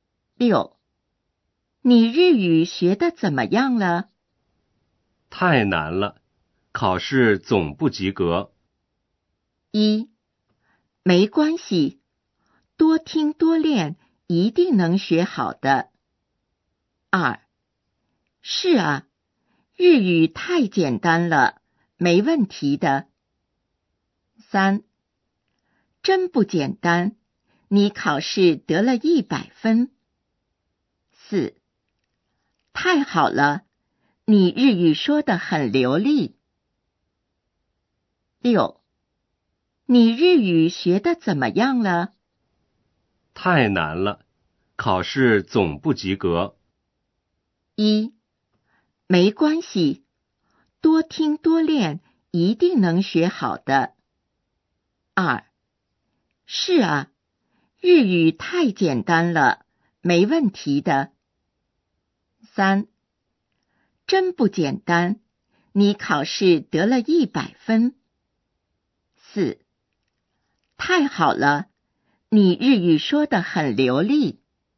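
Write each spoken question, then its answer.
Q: 太难了,考试总不及格。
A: 一: 没关系,多听多练,一定能学好的。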